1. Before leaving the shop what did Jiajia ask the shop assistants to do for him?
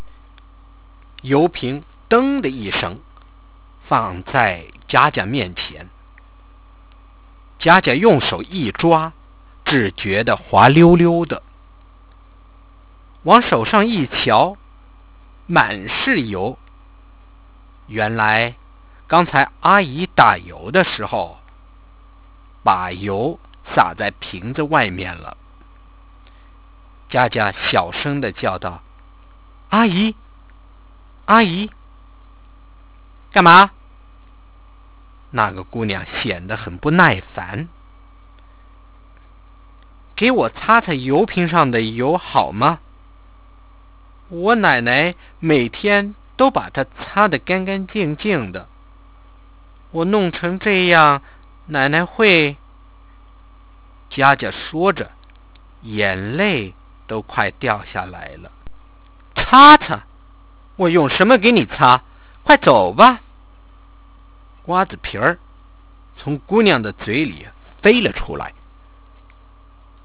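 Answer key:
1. To wipe the oil off the outside of the oil bottle

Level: 2nd year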